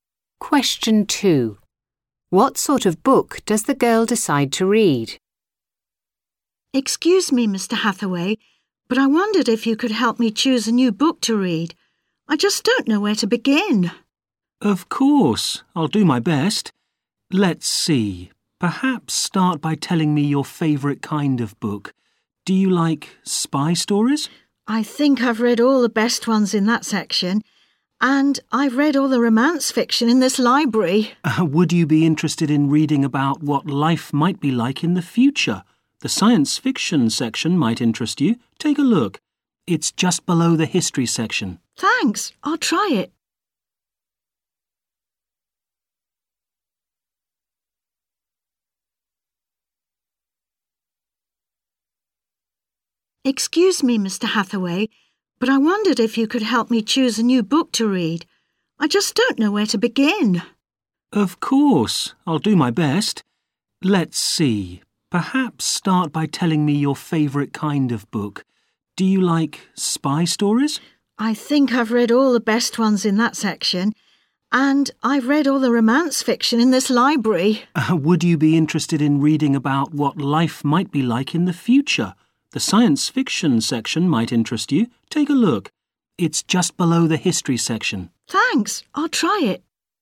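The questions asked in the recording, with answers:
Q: What sort of book does the girl decide to read?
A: Science fiction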